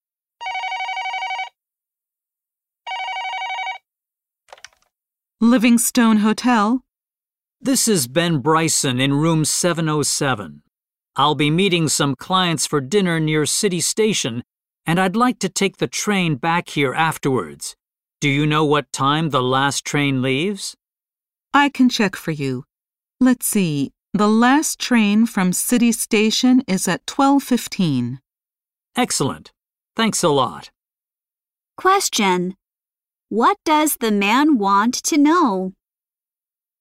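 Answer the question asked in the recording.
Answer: What time the last train leaves City Station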